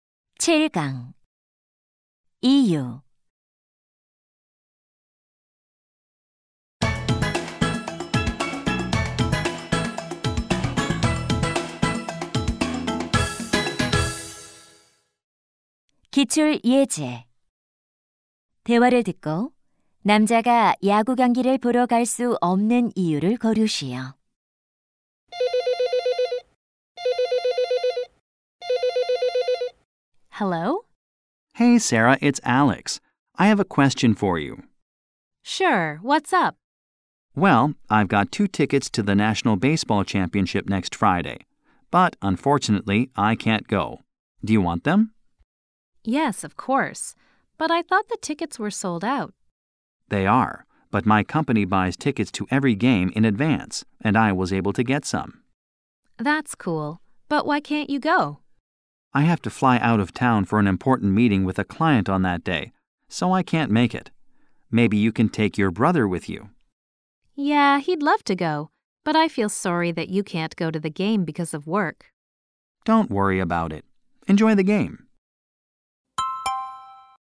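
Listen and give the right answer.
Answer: 고객과의 중요한 회의 때문에 출장을 가야 해서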